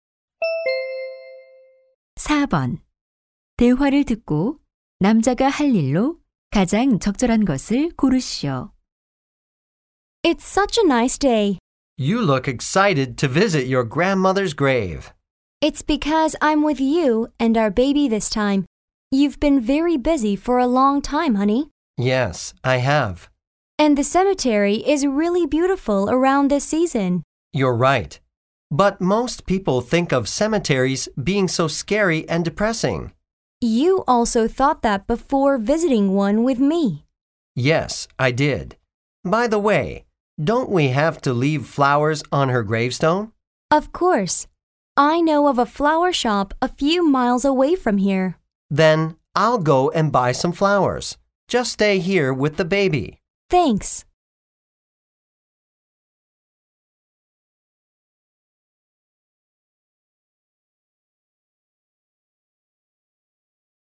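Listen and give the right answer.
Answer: 꽃 사러 가기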